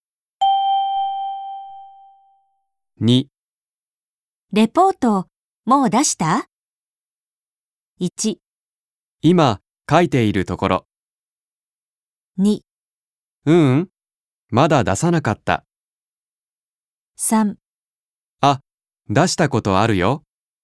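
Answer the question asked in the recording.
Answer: 1: 今、書いているところ。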